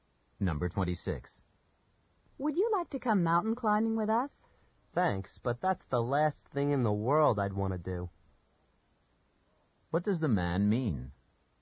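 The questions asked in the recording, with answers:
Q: What does the man mean?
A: He doesn't want to go mountain climbing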